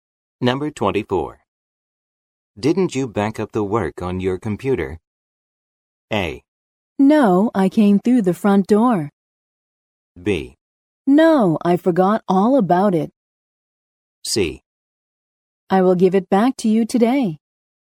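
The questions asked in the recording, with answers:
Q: Didn't you back up the work on your computer?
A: B: No, I forgot all about it.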